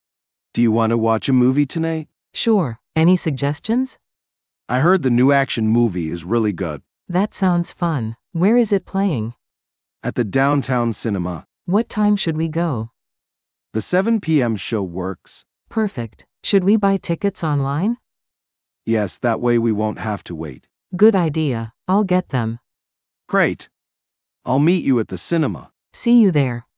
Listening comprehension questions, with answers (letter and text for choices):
Listen to a conversation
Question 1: What activity are they planning?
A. Going shopping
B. Watching a movie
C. Playing sports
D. Cooking dinner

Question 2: How will they get tickets?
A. At the cinema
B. Online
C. At a kiosk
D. With friends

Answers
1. B. Watching a movie
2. B. Online

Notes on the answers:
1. They plan to go watch a movie.
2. B suggests buying tickets online.